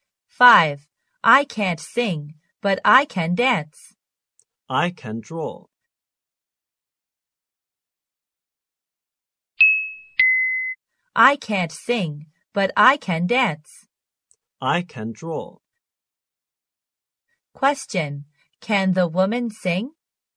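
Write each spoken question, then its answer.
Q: Can the woman sing?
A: No, she can't.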